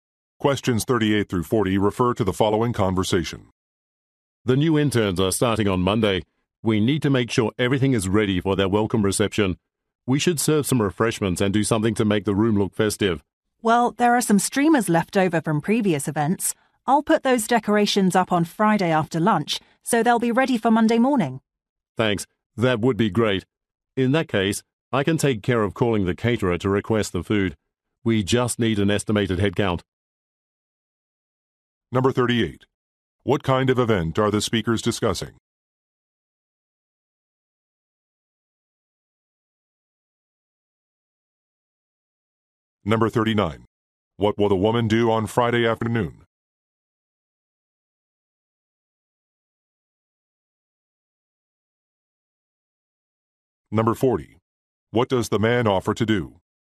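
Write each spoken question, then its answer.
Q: What kind of event are the speakers discussing?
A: A welcome reception for new interns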